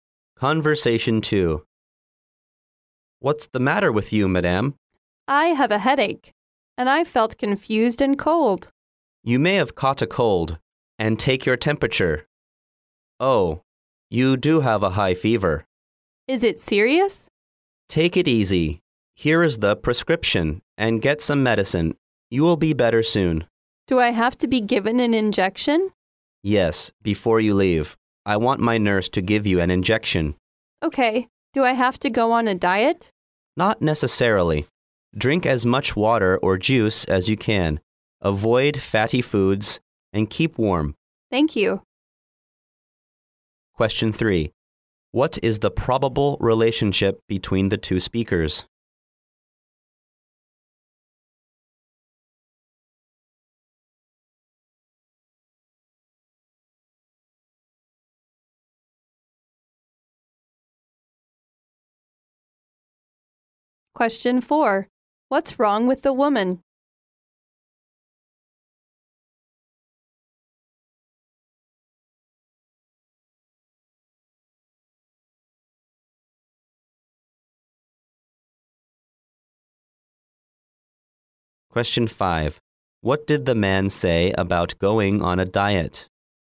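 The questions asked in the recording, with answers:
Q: What is the probable relationship between the two speakers?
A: Doctor and patient

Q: What's wrong with the woman?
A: She has a cold with a high fever

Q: What did the man say about going on a diet?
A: Not necessary; drink lots of water or juice, avoid fatty foods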